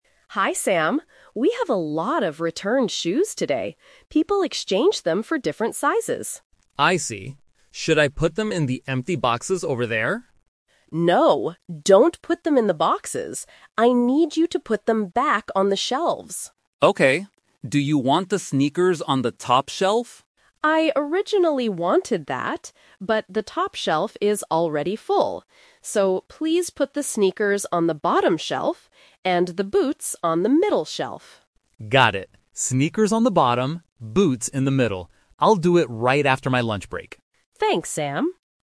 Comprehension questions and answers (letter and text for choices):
Listen to the conversation between a manager and a staff member. Read the questions and choose the correct answer (A, B, or C).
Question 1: Where will Sam put the returned shoes?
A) In the empty boxes.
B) On the shelves.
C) On the floor.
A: B) On the shelves.

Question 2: Where should Sam put the sneakers?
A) On the top shelf.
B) On the middle shelf.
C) On the bottom shelf.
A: C) On the bottom shelf.

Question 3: When will Sam do this task?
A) Right now.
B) Tomorrow morning.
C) After his lunch break.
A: C) After his lunch break.

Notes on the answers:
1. The manager says, "I need you to put them back on the shelves." Why the trap is wrong: Option (A) is a trap. Sam asks if he should put them in the boxes, but the manager says "No". Option (C) is not mentioned.
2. This is the "Twist". The manager says, "put the sneakers on the bottom shelf." Why the trap is wrong: Option (A) was the manager's original plan, but that shelf is full. Option (B) is the location for the boots, not the sneakers.
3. Sam says, "I'll do it right after my lunch break." Why the trap is wrong: Option (A) is what people usually expect in a work situation, but Sam explicitly states he will do it after lunch. Option (B) is not mentioned.

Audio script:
Manager: Hi Sam. We have a lot of returned shoes today. People exchanged them for different sizes.
Sam: I see. Should I put them in the empty boxes over there?
Manager: No, don't put them in the boxes. I need you to put them back on the shelves.
Sam: Okay. Do you want the sneakers on the top shelf?
Manager: I originally wanted that, but the top shelf is already full. So, please put the sneakers on the bottom shelf, and the boots on the middle shelf.
Sam: Got it. Sneakers on the bottom, boots in the middle. I'll do it right after my lunch break.